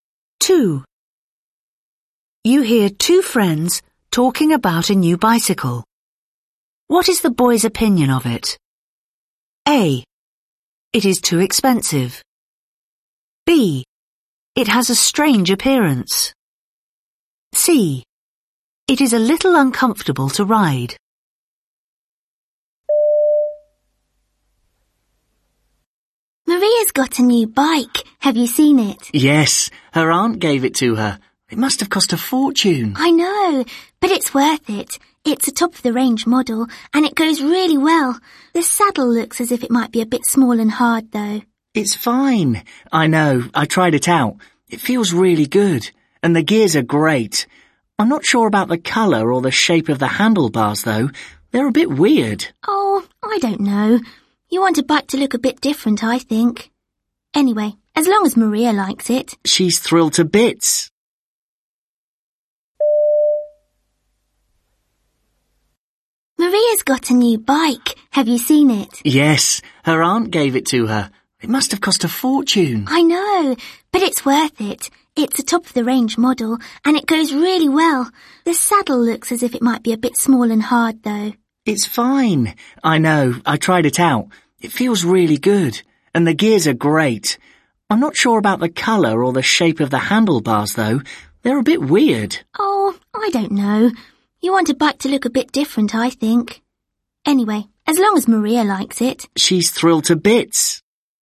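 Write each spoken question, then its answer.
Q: What is the boy's opinion of it?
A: B: It has a strange appearance.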